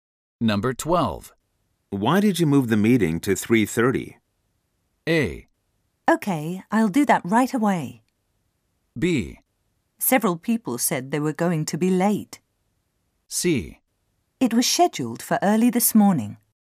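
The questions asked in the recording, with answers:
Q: Why did you move the meeting to 3:30?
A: B: Several people said they were going to be late.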